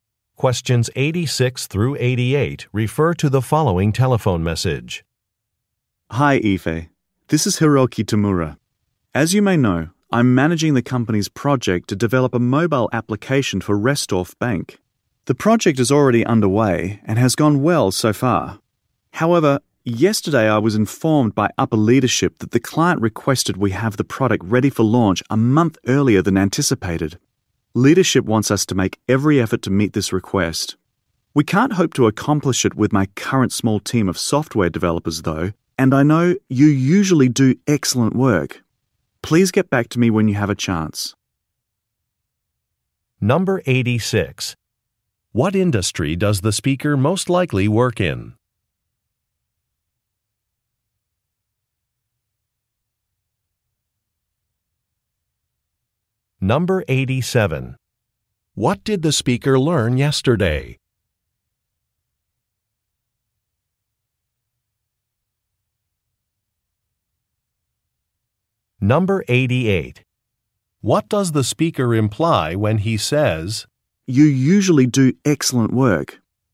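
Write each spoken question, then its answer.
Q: What industry does the speaker most likely work in?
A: Software development

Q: What did the speaker learn yesterday?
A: The client wants the product a month earlier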